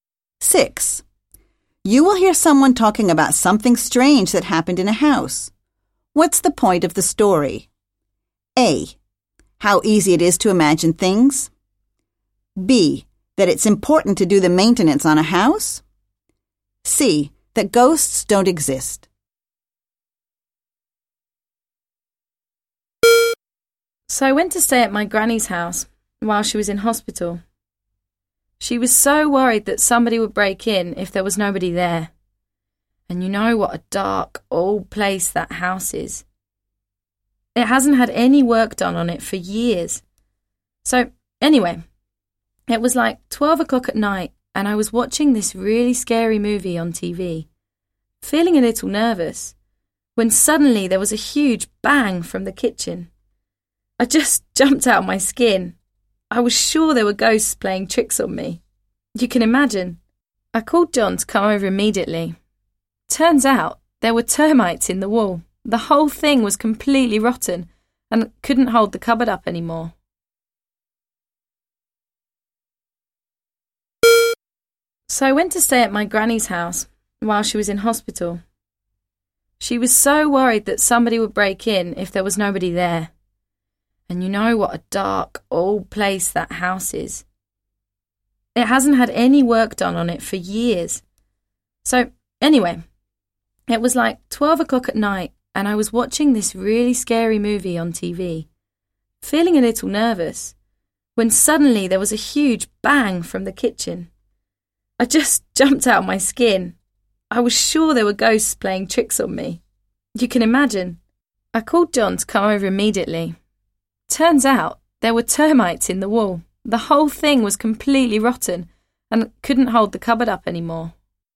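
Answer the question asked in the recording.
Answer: A: How easy it is to imagine things.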